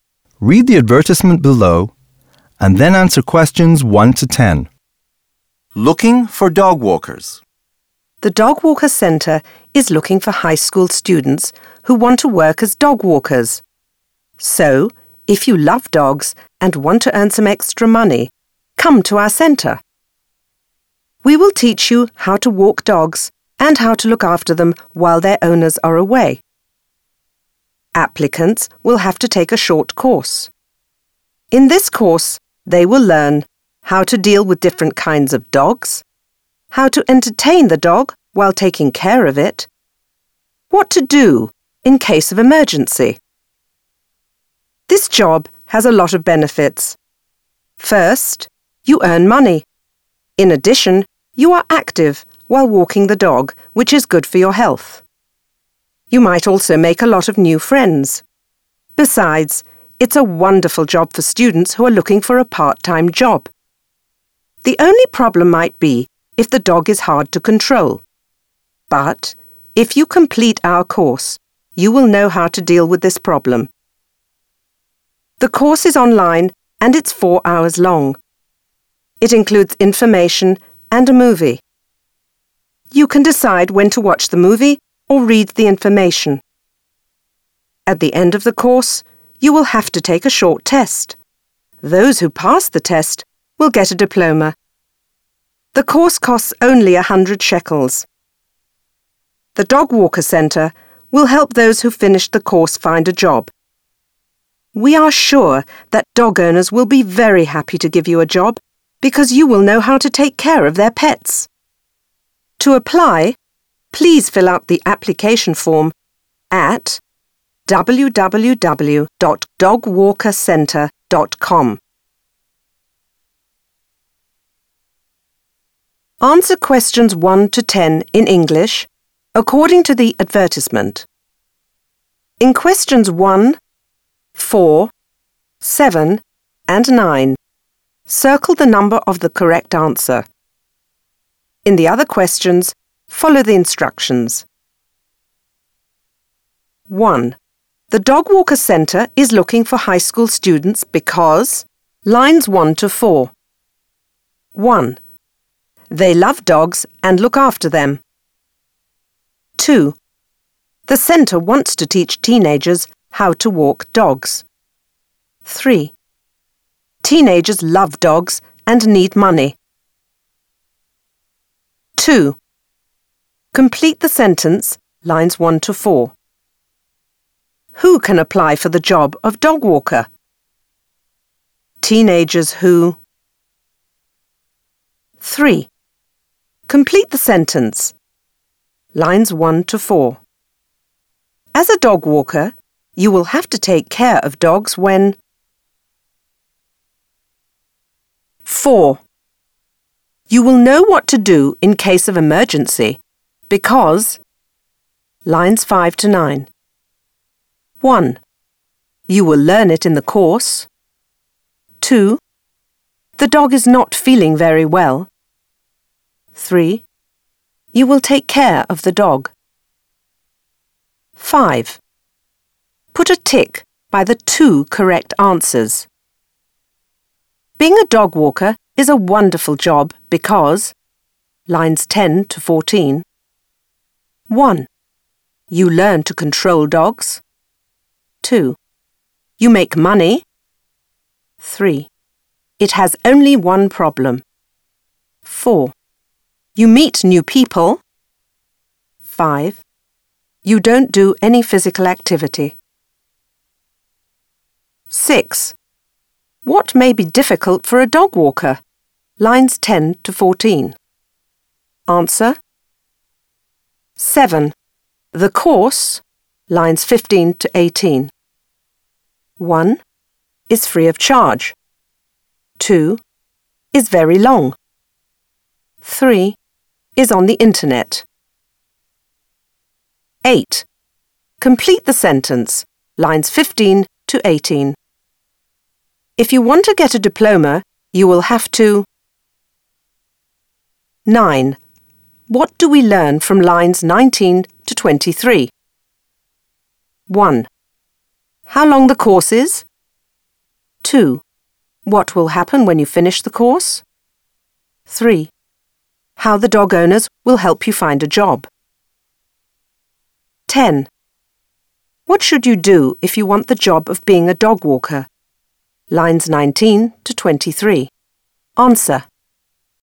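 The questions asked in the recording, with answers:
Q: Who can apply for the job of dog walker?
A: Teenagers who love dogs and want to earn extra money

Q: As a dog walker, you will have to take care of dogs when...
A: their owners are away

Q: You will know what to do in case of emergency because...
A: 1: You will learn it in the course.

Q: Put a tick by the 2 correct answers.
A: 2: You make money; 4: You meet new people

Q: What may be difficult for a dog walker?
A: Controlling a dog that is hard to control

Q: The course, lines 15 to 18.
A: 3: Is on the internet.

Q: If you want to get a diploma, you will have to...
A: pass a short test at the end of the course

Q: What do we learn from lines 19 to 23?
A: 2: What will happen when you finish the course

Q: What should you do if you want the job of being a dog walker?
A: Fill out the application form at www.dogwalkercentre.com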